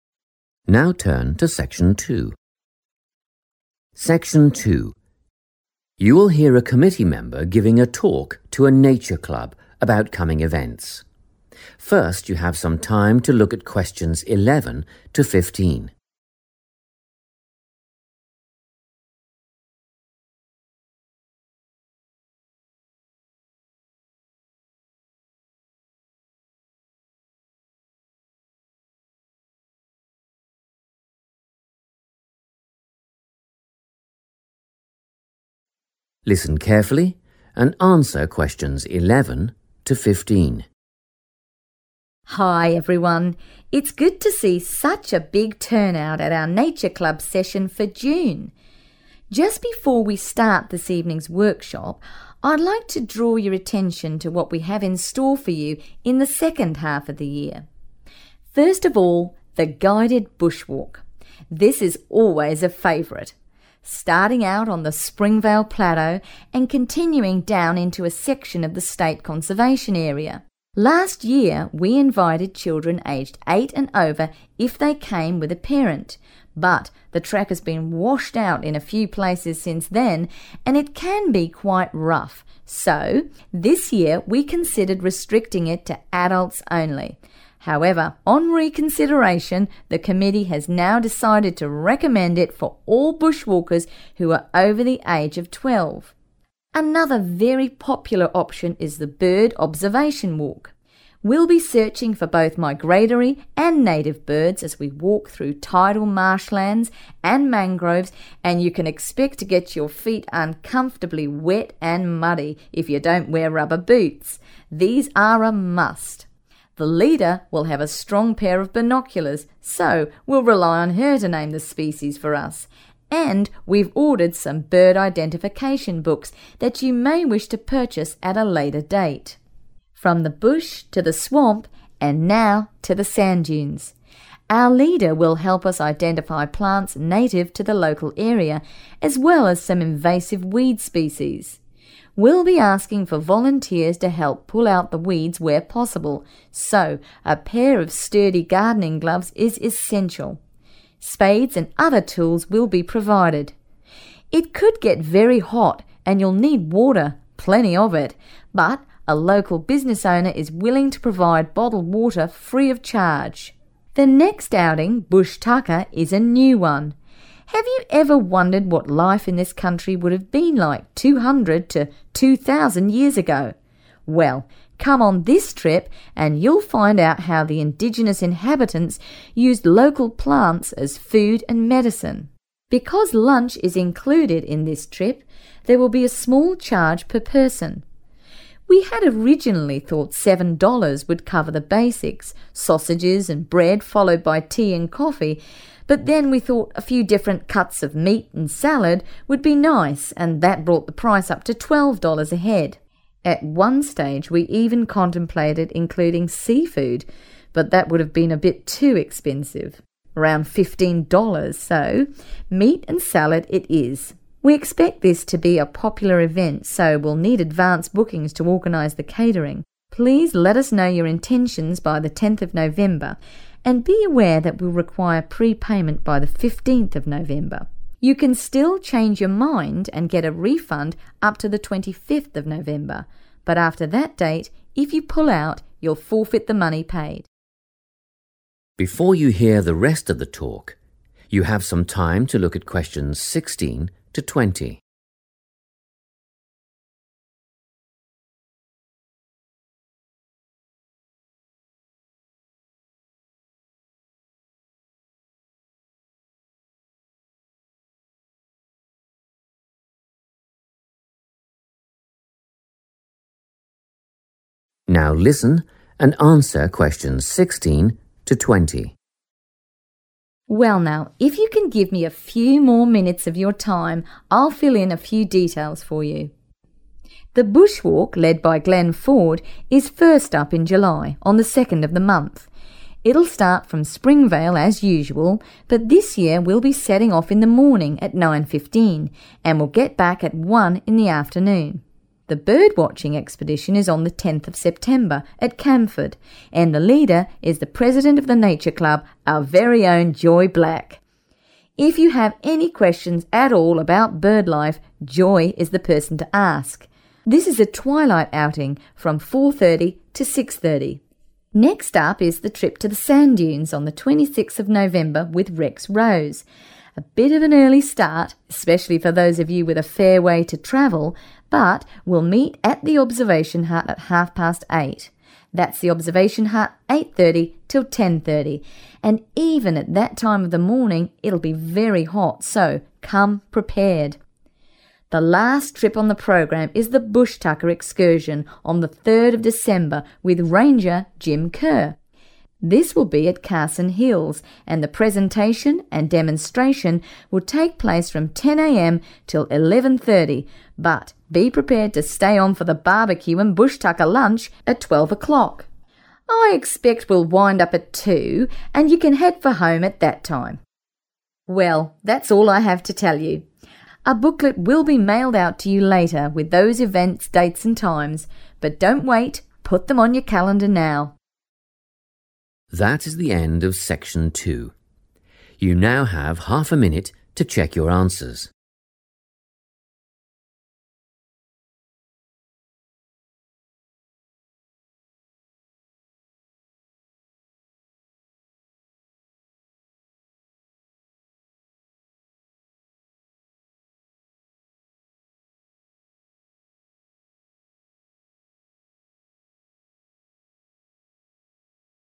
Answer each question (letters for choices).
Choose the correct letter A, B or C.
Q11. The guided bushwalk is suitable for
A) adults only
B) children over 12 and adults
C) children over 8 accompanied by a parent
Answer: B

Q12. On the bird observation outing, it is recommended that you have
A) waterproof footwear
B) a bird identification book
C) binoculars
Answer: A

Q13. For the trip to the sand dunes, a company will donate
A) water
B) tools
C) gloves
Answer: A

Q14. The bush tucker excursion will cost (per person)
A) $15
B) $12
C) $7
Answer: B

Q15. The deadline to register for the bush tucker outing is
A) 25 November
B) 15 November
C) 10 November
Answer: C

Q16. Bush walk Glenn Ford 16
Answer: 2 July / 2nd July / July 2nd / July 2

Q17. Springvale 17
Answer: 9.15 am / 9.15 a.m. / 9:15 am / 9:15 a.m. / nine fifteen am / nine fifteen a.m.

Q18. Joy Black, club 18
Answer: president

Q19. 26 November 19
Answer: observation hut

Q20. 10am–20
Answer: 2 pm / 2 p.m. / two pm / two p.m.

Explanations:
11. The correct answer is B because the committee decided on a new rule for this year. They initially thought about limiting the walk to 'adults only' because the path is currently 'rough' (not easy to walk on). However, after thinking about it again ('reconsideration'), they 'decided' that anyone who is 'over the age of 12' can join. This rule replaces last year's rule which allowed younger children aged 8 with a parent.
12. The correct answer is A because the speaker explains that the area for the walk is wet and full of mud. She says that wearing 'rubber boots' is 'a must,' which means it is a very strong recommendation or requirement for the trip. The speaker also mentions that the leader will have binoculars (so you do not need your own) and that books can be bought at a later time, making the waterproof shoes the most important thing to bring.
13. The correct answer is A because the transcript says a local business owner will provide bottled water 'free of charge'. In English, when someone provides something 'free of charge', it means they are giving it away without asking for money, which is the same as a donation. While tools are also 'provided', the transcript specifically mentions a business owner (a company) as the person donating the water.
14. The correct answer is B because the speaker explains how the price changed. At first, they thought $7 would be enough for a simple meal. Then, they decided to offer a better meal with meat and salad, which changed the cost to $12. They also thought about $15 for seafood but decided it was too much money. Therefore, they stayed with the $12 price.
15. The correct answer is 10 November because the speaker says the club needs to know who is coming beforehand to plan the food. They use the phrase 'let us know your intentions' to mean 'register' or 'sign up.' Other dates like November 15 (for paying) and November 25 (for getting money back if you cancel) are mentioned, but November 10 is the deadline for the initial sign-up.
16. The correct answer is derived from the speaker's description of the events for the second half of the year. When talking about the 'bush walk' led by 'Glenn Ford', the speaker mentions it happens in 'July' on the 'second of the month'. Combining these gives you the date 2nd July.
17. The correct answer is found by listening for the start time of the bush walk. The speaker uses the phrase 'setting off,' which is a common way to say starting a trip or journey. He clearly states that they will be doing this at 'nine fifteen' in the morning.
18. The correct answer is 'president' because the speaker names Joy Black as the leader of the bird watching trip and explains that she is the club's president. In the table, the space follows 'Joy Black, club', so it needs her specific role within the club.
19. The correct answer is identified when the speaker details the trip to the sand dunes on 26 November. The speaker explicitly states that the group will meet at the observation hut. The word 'venue' in the table refers to the location or meeting point, and the speaker confirms this by saying 'we'll meet at' followed by the name of the place.
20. The correct answer is based on the speaker's description of the 'bush tucker excursion' schedule. While the initial presentation starts at 10:00 am and ends at 11:30 am, there is a lunch starting at 12:00. The speaker uses the phrase 'wind up' (which means to finish or end a session) to state that the entire event concludes at two.

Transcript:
Section 2
You will hear a committee member giving a talk to a Nature Club about coming events. First you have some time to look at questions 11 to 15.
Listen carefully and answer questions 11 to 15.
Hi everyone. It's good to see such a big turnout at our Nature Club session for June. Just before we start this evening's workshop, I'd like to draw your attention to what we have in store for you in the second half of the year.
First of all, the guided bushwalk – this is always a favourite – starting out on the Springvale plateau and continuing down into a section of the state conservation area. Last year, we invited children aged 8 and over if they came with a parent, but the track has been washed out in a few places since then and it can be quite rough, so this year we considered restricting it to adults only ... however, on reconsideration, the committee has now decided to recommend it for all bushwalkers who are over the age of 12.
Another very popular option is the bird observation walk. We'll be searching for both migratory and native birds as we walk through tidal marshlands and mangroves and you can expect to get your feet uncomfortably wet and muddy if you don't wear rubber boots – these are a must. The leader will have a strong pair of binoculars, so we'll rely on her to name the species for us ... and we've ordered some bird identification books that you may wish to purchase at a later date.
From the bush to the swamp, and now to the sand dunes ... Our leader will help us identify plants native to the local area as well as some invasive weed species. We'll be asking for volunteers to help pull out the weeds where possible, so a pair of sturdy gardening gloves is essential. Spades and other tools will be provided. It could get very hot and you'll need water – plenty of it – but a local business owner is willing to provide bottled water free of charge.
The next outing, bush tucker, is a new one – have you ever wondered what life in this country would have been like two hundred to two thousand years ago? Well, come on this trip and you'll find out how the indigenous inhabitants used local plants as food and medicine.
Because lunch is included in this trip, there will be a small charge per person. We had originally thought 7 dollars would cover the basics – sausages and bread followed by tea and coffee, but then we thought a few different cuts of meat and salad would be nice and that brought the price up to 12 dollars a head. At one stage we even contemplated including seafood, but that would have been a bit too expensive – around 15 dollars – so meat and salad it is. We expect this to be a popular event, so we'll need advance bookings to organise the catering. Please let us know your intentions by the 10th of November, and be aware that we'll require pre-payment by the 15th of November. You can still change your mind and get a refund up to the 25th of November but after that date, if you pull out, you'll forfeit the money paid.
Before you hear the rest of the talk, you have some time to look at questions 16 to 20.
Now listen and answer questions 16 to 20.
Well, now ... if you can give me a few more minutes of your time, I'll fill in a few details for you. The bush walk, led by Glenn Ford, is first up in July – on the second of the month. It'll start from Springvale as usual but this year we'll be setting off in the morning, at nine fifteen, and we'll get back at one in the afternoon.
The bird watching expedition is on the tenth of September at Camford and the leader is the president of the Nature Club, our very own Joy Black. If you have any questions at all about bird life, Joy is the person to ask. This is a twilight outing from 4.30 to 6.30.
Next up is the trip to the sand dunes on 26 November with Rex Rose. A bit of an early start – especially for those of you with a fair way to travel – but we'll meet at the observation hut at half past eight. That's the observation hut, 8.30 till 10.30, and even at that time of the morning it'll be very hot, so come prepared!
The last trip on the programme is the bush tucker excursion on the third of December with ranger Jim Kerr. This will be at Carson Hills and the presentation and demonstration will take place from 10 am till 11.30 but be prepared to stay on for the barbecue and bush tucker lunch at 12 o'clock. I expect we'll wind up at two and you can head for home at that time.
Well, that's all I have to tell you. A booklet will be mailed out to you later with those events, dates and times – but don't wait, put them on your calendar now.
That is the end of section 2. You now have half a minute to check your answers.